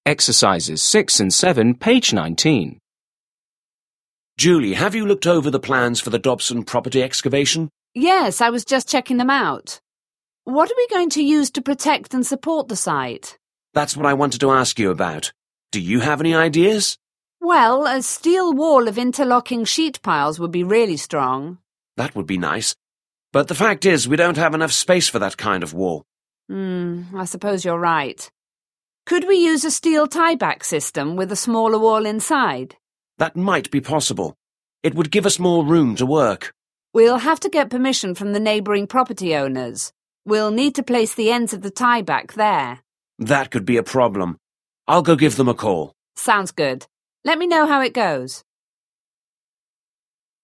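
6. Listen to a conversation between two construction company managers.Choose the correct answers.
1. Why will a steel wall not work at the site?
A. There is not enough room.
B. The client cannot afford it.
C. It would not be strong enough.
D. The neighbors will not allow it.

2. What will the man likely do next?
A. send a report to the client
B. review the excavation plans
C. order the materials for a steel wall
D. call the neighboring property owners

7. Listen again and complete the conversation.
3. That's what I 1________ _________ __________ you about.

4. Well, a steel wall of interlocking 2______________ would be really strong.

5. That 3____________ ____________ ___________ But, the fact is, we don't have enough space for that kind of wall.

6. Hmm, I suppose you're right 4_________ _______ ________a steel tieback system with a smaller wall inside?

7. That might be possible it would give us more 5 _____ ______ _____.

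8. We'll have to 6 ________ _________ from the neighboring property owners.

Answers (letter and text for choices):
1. A. There is not enough room.
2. D. call the neighboring property owners
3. wanted to ask
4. sheet piles
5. would be nice
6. Could we use
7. room to work
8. get permission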